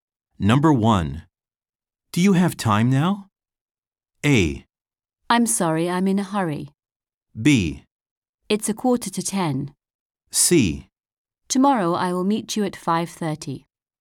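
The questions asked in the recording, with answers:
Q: Do you have time now?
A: A: I'm sorry, I'm in a hurry.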